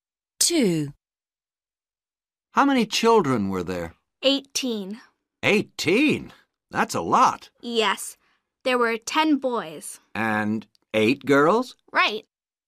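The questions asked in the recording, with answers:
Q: How many children were there?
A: 18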